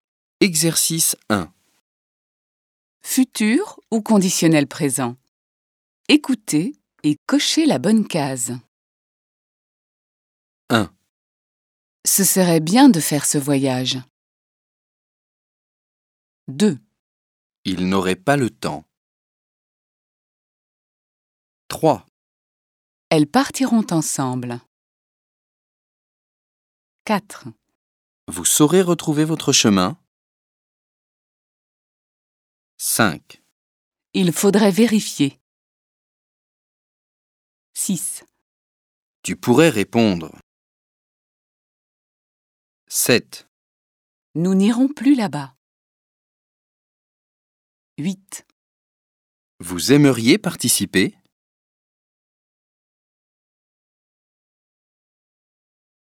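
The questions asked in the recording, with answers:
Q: Ce serait bien de faire ce voyage.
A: conditionnel présent

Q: Il n'aurait pas le temps.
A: conditionnel présent

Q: Elles partiront ensemble.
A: futur

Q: Vous saurez retrouver votre chemin.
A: futur

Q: Il faudrait vérifier.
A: conditionnel présent

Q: Tu pourrais répondre.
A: conditionnel présent

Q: Nous n'irons plus là-bas.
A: futur

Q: Vous aimeriez participer ?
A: conditionnel présent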